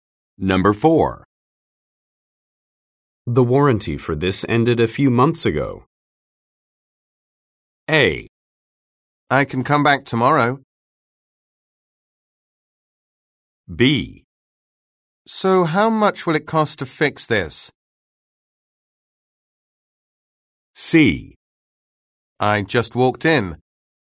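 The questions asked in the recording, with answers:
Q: The warranty for this ended a few months ago.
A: B: So how much will it cost to fix this?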